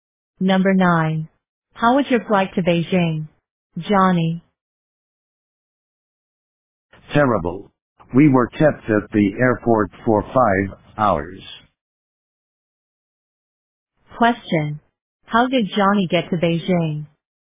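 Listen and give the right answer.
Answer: By plane.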